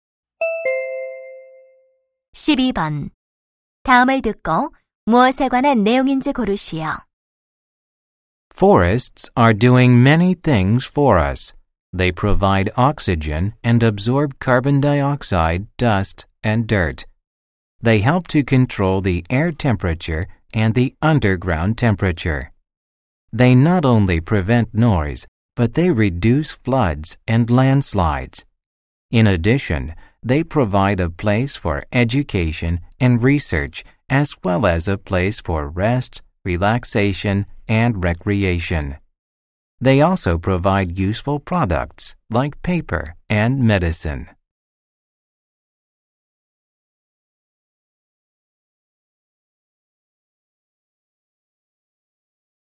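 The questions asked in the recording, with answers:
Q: 다음을 듣고 무엇에 관한 내용인지 고르시오.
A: 숲의 역할(이로움)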